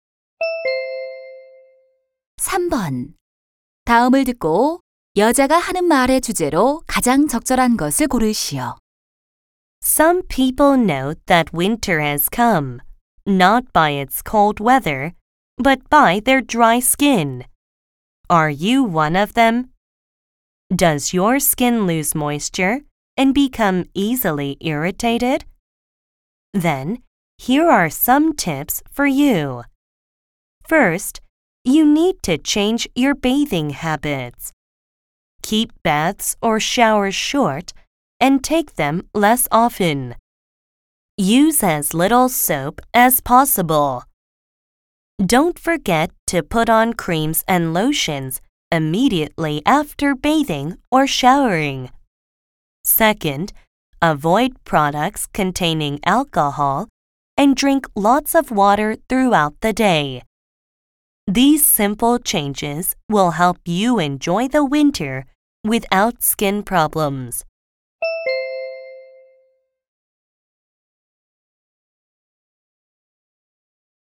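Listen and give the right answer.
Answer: 겨울철 건조한 피부 관리 방법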